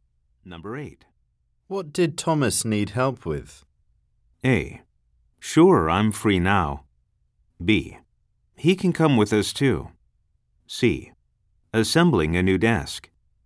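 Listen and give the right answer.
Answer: C: Assembling a new desk.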